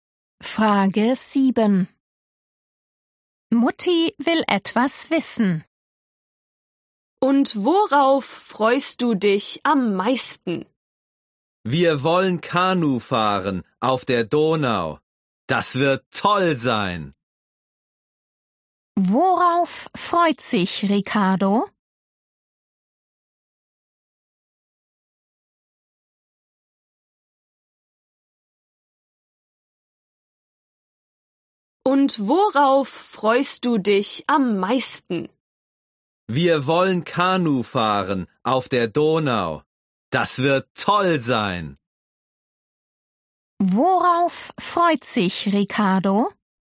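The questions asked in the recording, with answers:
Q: Worauf freut sich Ricardo?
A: auf Kanufahren auf der Donau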